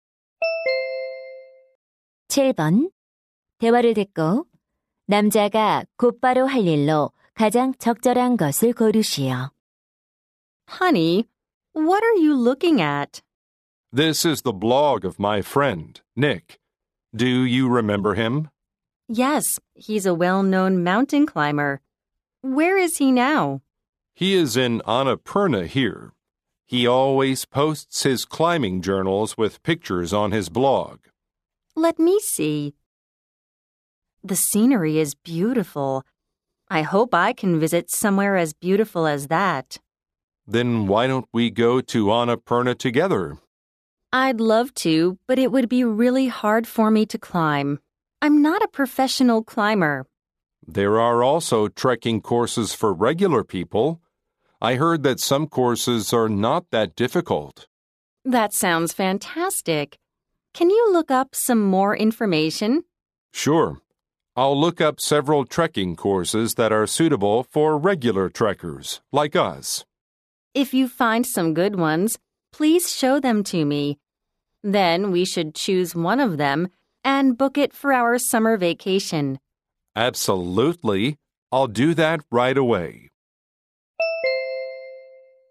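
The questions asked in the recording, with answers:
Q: 대화를 듣고 남자가 곧바로 할 일로 가장 적절한 것을 고르시오.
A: 트레킹 코스 정보 찾아보기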